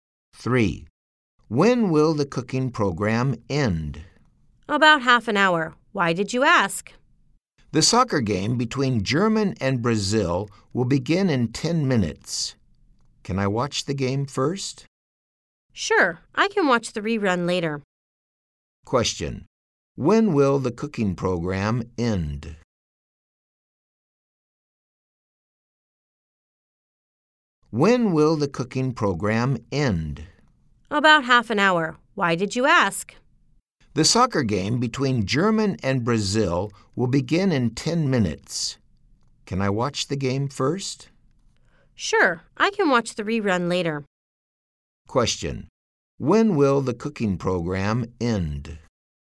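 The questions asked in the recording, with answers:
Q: When will the cooking program end?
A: In about half an hour.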